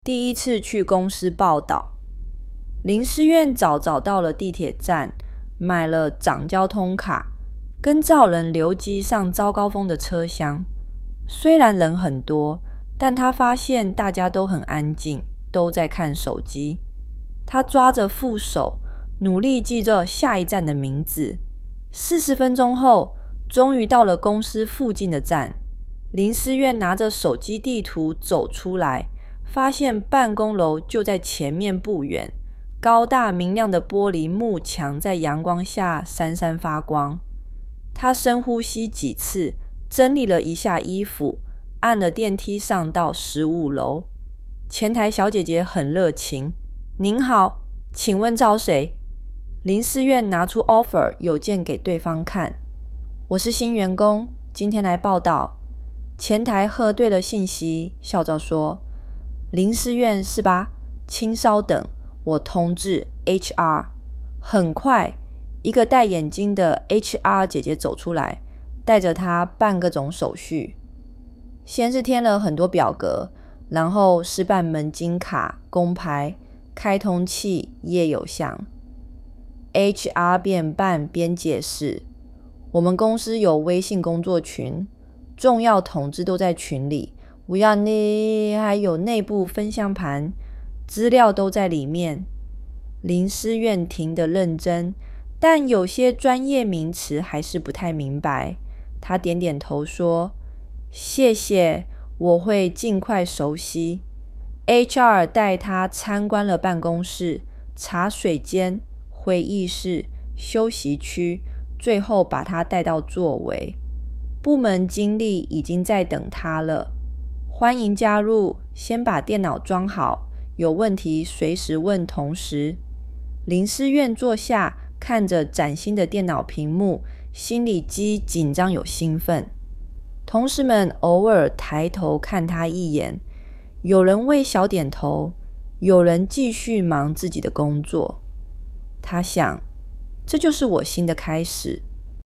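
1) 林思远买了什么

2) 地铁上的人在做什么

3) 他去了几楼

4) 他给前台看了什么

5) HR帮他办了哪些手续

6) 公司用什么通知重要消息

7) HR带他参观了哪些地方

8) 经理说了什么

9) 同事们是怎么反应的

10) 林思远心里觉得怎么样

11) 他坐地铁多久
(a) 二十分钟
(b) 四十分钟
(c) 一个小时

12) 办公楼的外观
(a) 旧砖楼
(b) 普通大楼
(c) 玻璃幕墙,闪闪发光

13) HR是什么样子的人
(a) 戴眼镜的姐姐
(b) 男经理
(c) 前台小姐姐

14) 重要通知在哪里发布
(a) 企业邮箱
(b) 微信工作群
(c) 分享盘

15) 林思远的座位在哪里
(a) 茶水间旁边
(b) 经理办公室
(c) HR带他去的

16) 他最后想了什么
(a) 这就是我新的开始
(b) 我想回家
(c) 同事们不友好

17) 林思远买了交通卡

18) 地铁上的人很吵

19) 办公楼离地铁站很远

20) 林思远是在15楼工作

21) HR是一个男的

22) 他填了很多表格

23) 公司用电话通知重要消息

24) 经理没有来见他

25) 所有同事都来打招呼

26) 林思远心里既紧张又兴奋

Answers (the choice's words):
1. 一张交通卡
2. 很安静,都在看手机
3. 15楼
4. offer邮件
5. 填表格、办门禁卡和工牌、开通企业邮箱
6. 微信工作群
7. 办公室、茶水间、会议室、休息区
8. 欢迎加入!先把电脑装好,有问题随时问同事
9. 偶尔抬头看他,有人微笑点头,有人继续忙工作
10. 既紧张又兴奋
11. 四十分钟
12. 玻璃幕墙,闪闪发光
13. 戴眼镜的姐姐
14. 微信工作群
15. HR带他去的
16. 这就是我新的开始
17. 对
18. 错
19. 错
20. 对
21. 错
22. 对
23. 错
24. 错
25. 错
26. 对

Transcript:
第一次去公司报到
林思远早早到了地铁站,买了张交通卡,跟着人流挤上早高峰的车厢。虽然人很多,但他发现大家都很安静,都在看手机。他抓着扶手,努力记住下一站的名字。
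四十分钟后,终于到了公司附近的站。林思远拿着手机地图走出来,发现办公楼就在前面不远,高大明亮的玻璃幕墙在阳光下闪闪发光。他深呼吸几次,整理了一下衣服,按了电梯上到15楼。
前台小姐姐很热情:"您好,请问找谁?"林思远拿出offer邮件给对方看:"我是新员工,今天来报到。"前台核对了信息,笑着说:"林思远是吧?请稍等,我通知HR。"
很快,一个戴眼镜的HR姐姐走出来,带着他办各种手续。先是填了很多表格,然后是办门禁卡工牌、开通企业邮箱。HR边办边解释:"我们公司有微信工作群,重要通知都在群里,还有内部分享盘,资料都在里面。
林思远听得认真,但有些专业名词还是不太明白。他点点头说:"谢谢,我会尽快熟悉。"HR带他参观了办公室,茶水间会议室、休息区,最后把他带到座位。
部门经理已经在等他了:"欢迎加入!先把电脑装好,有问题随时问同事。"林思远坐下,看着崭新的电脑屏幕,心里既紧张又兴奋。同事们偶尔抬头看他一眼,有人微笑点头,有人继续忙自己的工作。他想:"这就是我新的开始。

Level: HSK4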